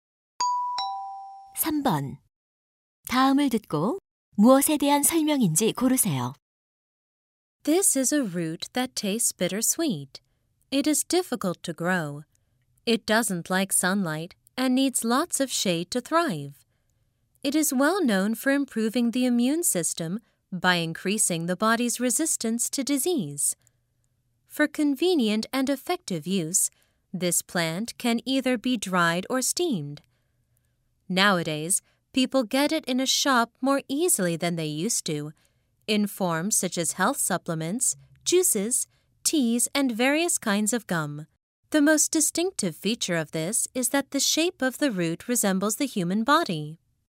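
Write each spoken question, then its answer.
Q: 다음을 듣고 무엇에 대한 설명인지 고르세요.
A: 인삼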